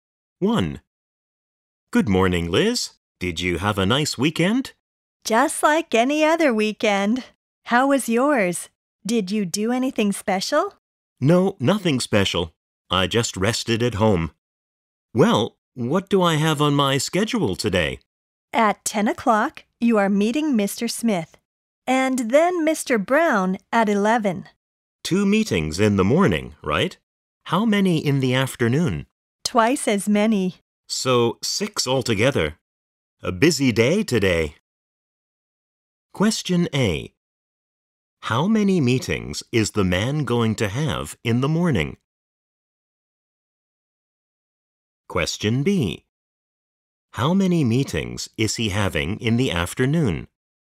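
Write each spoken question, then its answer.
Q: How many meetings is the man going to have in the morning?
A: Two

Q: How many meetings is he having in the afternoon?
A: Four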